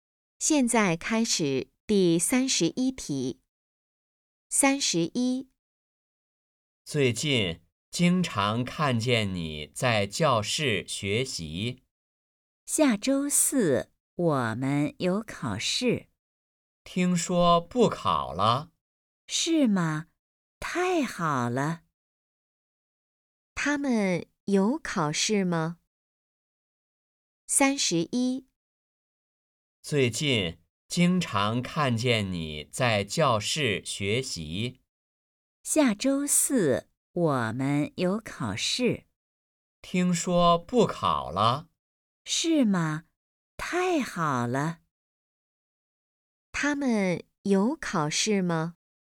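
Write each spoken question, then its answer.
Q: 他们有考试吗?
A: 没有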